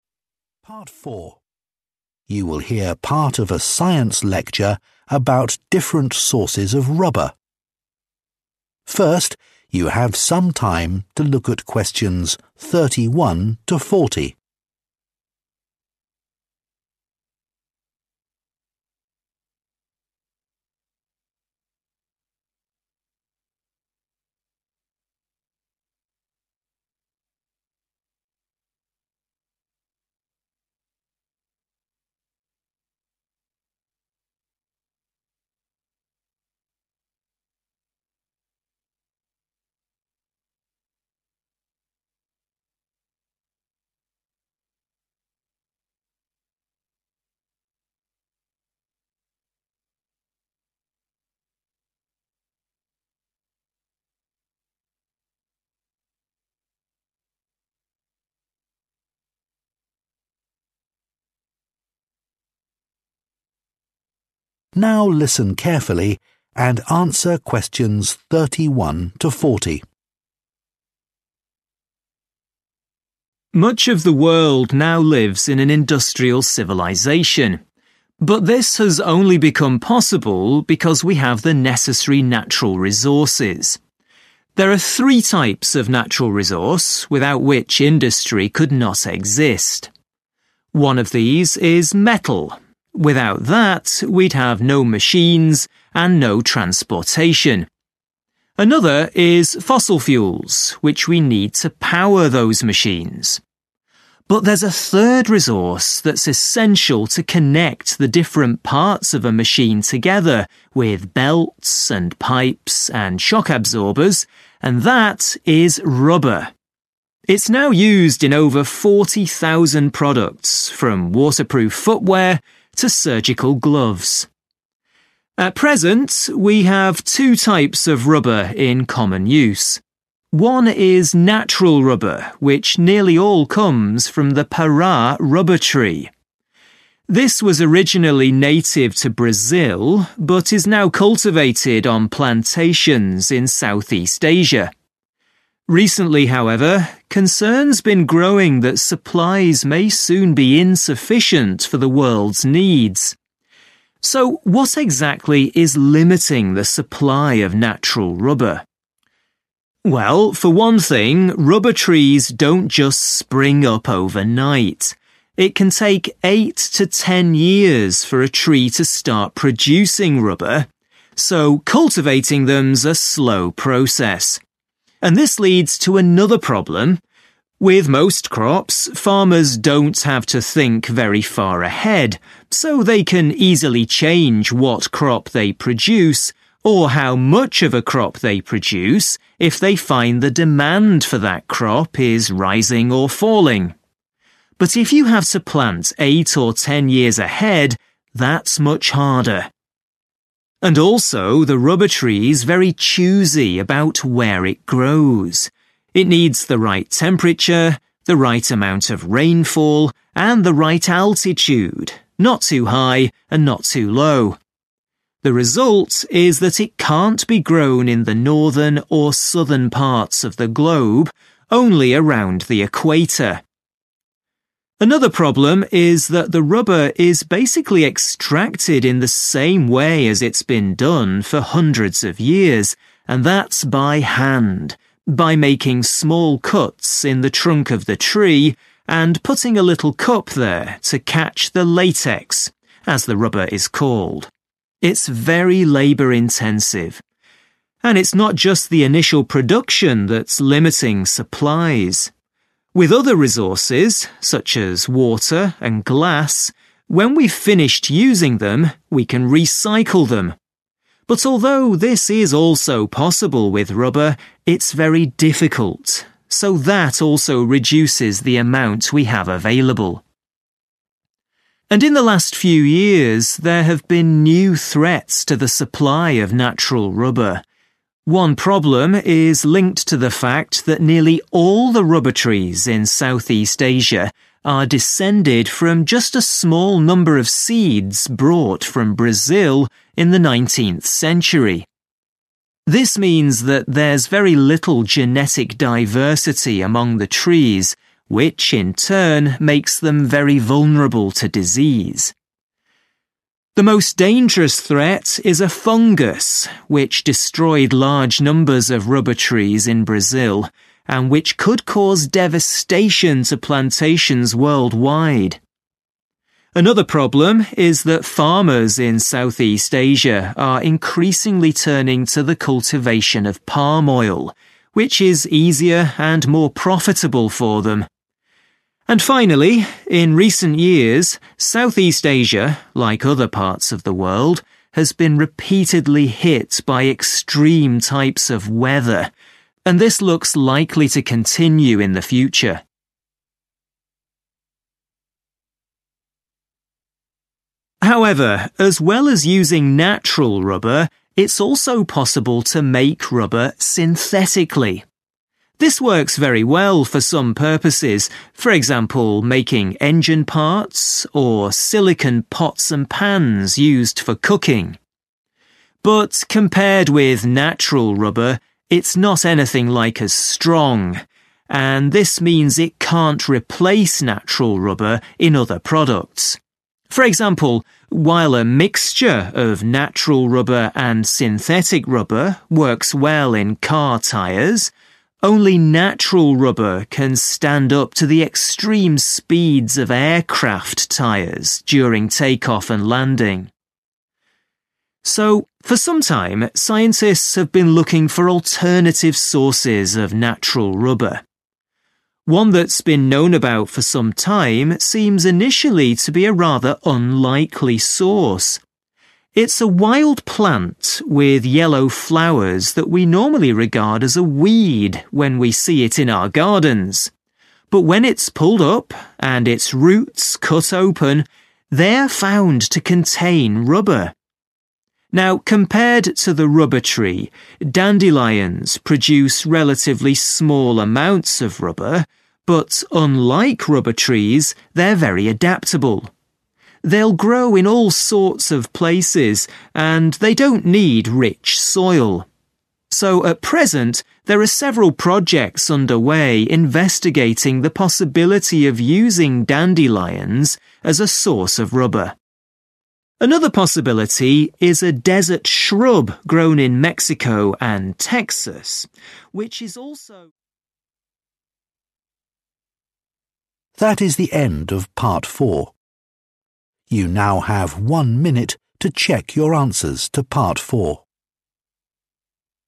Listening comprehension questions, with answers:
Complete the notes below. Write ONE WORD ONLY for each answer.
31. 31 ··································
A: metal

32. the growth of the tree is 32 ...............................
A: slow

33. production cannot easily be adjusted because of increasing or decreasing 33 ..................................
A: demand

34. the tree only grows near the 34 ....................................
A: equator

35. it is very difficult to 35 ................................. rubber after production.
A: recycle

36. lack of genetic diversity, leading to danger of disease caused by a 36 .......................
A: fungus

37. extreme 37 ..................................... events.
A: weather

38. is less 38 ................................... than natural rubber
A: strong

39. A wild flower (a type of dandelion) has rubber in its 39 ...........................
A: roots

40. It can be grown in many locations and does not require good 40....................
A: soil

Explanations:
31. Nội dung bài: Kim loại – metal là 1 trong 3 loại tài nguyên mà nền công nghiệp không thể thiếu.
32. Nội dung bài: Cao su bắt nguồn từ Brazil. Tuy cao su được bắt đầu trồng trọt ở Đông Nam Á nhưng dự đoán thời gian sắp tới sẽ bị thiếu nguồn cung cấp, vì cần tốn từ 8 đến 10 năm để sản xuất ra cao su.
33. Nội dung bài: Vẫn đang nói về việc trồng cao su trong vòng 8-10 năm nữa. Mặc dù với hầu hết các loại cây thì nông dân không cần phải nghĩ quá xa về tương lai vì họ có thể thay đổi loại cây hay sản lượng họ sản xuất theo ý muốn nếu họ nhận thấy nhu cầu của loại cây đó đang tăng hay giảm. Tuy nhiên để trồng cho 8-10 năm nữa thì sẽ khó hơn nhiều.
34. Nội dung bài: Cây cao su cũng cần một nhiệt độ, một lượng mưa và mực nước biển nhất định để có thể mọc lên. Vì vậy nên chúng chỉ có thể mọc quanh vùng xích đạo thôi.
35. Nội dung bài: Đối với các loại tài nguyên khác như nước hay thuỷ tinh thì có thể tái sử dụng sau khi dùng xong. Tuy nhiên đối với
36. Nội dung bài: Vì các cây cao su được trông ở Đông Nam Á được bắt nguồn từ một số ít hạt giống được lấy từ thế kỷ 19 → thiếu sự đa dạng về gene → rất dễ dính dịch bệnh → bệnh nguy hiểm nhất là bệnh nấm – fungus.
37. Nội dung bài: Trong những năm gần đây Đông Nam Á đã gặp rất nhiều tình trạng thời tiết khắc nghiệt.
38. Nội dung bài: Mặc dù cao su nhân tạo cũng được dùng làm động cơ hay đồ dùng để nấu ăn nhưng so với cao su tự nhiên thì nó không khoẻ bằng.
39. Nội dung bài: Một loài cây khác là phiên bản tương đương của cao su tự nhiên là một cây dại có hoa vàng mà thường được nhầm là cần sa. Nhưng khi họ kéo cây lên và cắt rễ ra thì chúng có cao su trong đó.
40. Nội dung bài: Một nguồn thay thế cho cao su tự nhiên có thể được trồng ở nhiều nơi và chúng cũng không cần hạt giống tốt.

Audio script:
Much of the world now lives in an industrial civilisation. But this has only become possible because we have the necessary natural resources. There are three types of natural resource without which industry could not exist. One of these is metal. Without that, we'd have no machines and no transportation. Another is fossil fuels, which we need to power those machines. But there's a third resource that's essential to connect the different parts of a machine together with belts, and pipes, and shock absorbers, and that is rubber. It's now used in over 40,000 products, from waterproof footwear to surgical gloves.
At present, we have two types of rubber in common use. One is natural rubber, which nearly all comes from the Pará rubber tree. This was originally native to Brazil, but is now cultivated on plantations in Southeast Asia. Recently, however, concerns have been growing that supplies may soon be insufficient for the world's needs.
So, what exactly is limiting the supply of natural rubber? Well, for one thing, rubber trees don't just spring up overnight. It can take eight to ten years for a tree to start producing rubber, so cultivating them is a slow process. And this leads to another problem. With most crops, farmers don't have to think very far ahead, so they can easily change what crop they produce, or how much of a crop they produce, if they find the demand for that crop is rising or falling. But if you have to plant eight or ten years ahead, that's much harder. And also, the rubber tree is very choosy about where it grows. It needs the right temperature, the right amount of rainfall, and the right altitude – not too high and not too low. The result is that it can't be grown in the northern or southern parts of the globe, only around the equator.
Another problem is that the rubber is basically extracted in the same way as it's been done for hundreds of years, and that's by hand, by making small cuts in the trunk of the tree and putting a little cup there to catch the latex, as the rubber is called. It's very labour-intensive. And it's not just the initial production that's limiting supplies. With other resources, such as water and glass, when we've finished using them, we can recycle them. But although this is also possible with rubber, it's very difficult, so that also reduces the amount we have available.
And in the last few years, there have been new threats to the supply of natural rubber. One problem is linked to the fact that nearly all the rubber trees in Southeast Asia are descended from just a small number of seeds brought from Brazil in the 19th century. This means that there's very little genetic diversity among the trees, which in turn makes them very vulnerable to disease. The most dangerous threat is a fungus, which destroyed large numbers of rubber trees in Brazil, and which could cause devastation to plantations worldwide. Another problem is that farmers in Southeast Asia are increasingly turning to the cultivation of palm oil, which is easier and more profitable for them. And finally, in recent years, Southeast Asia, like other parts of the world, has been repeatedly hit by extreme types of weather, and this looks likely to continue in the future.
However, as well as using natural rubber, it's also possible to make rubber synthetically. This works very well for some purposes, for example, making engine parts, or silicone pots and pans used for cooking. But compared with natural rubber, it's not anything like as strong, and this means it can't replace natural rubber in other products. For example, while a mixture of natural rubber and synthetic rubber works well in car tyres, only natural rubber can stand up to the extreme speeds of aircraft tyres during take-off and landing.
So for some time, scientists have been looking for alternative sources of natural rubber. One that's been known about for some time seems initially to be a rather unlikely source. It's a wild plant with yellow flowers that we normally regard as a weed when we see it in our gardens: dandelions. But when it's pulled up and its roots cut open, they are found to contain rubber. Now, compared to the rubber tree, dandelions produce relatively small amounts of rubber, but, unlike rubber trees, they're very adaptable. They'll grow in all sorts of places, and they don't need rich soil. So at present, there are several projects underway investigating the possibility of using dandelions as a source of rubber. Another possibility is a desert shrub grown in Mexico and Texas, which is also...
GapFill: Questions from 31 to 40
Câu 31: Three resources which are essential for industrial civilisation
• fossil fuels
• rubber